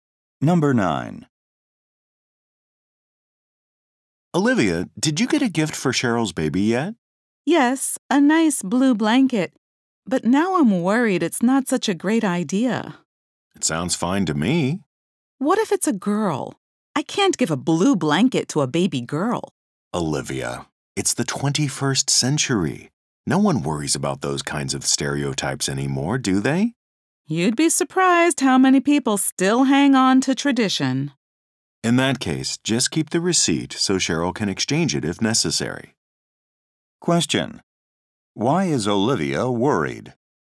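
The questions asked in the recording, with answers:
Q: Why is Olivia worried?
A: The baby may be a girl and she bought a blue blanket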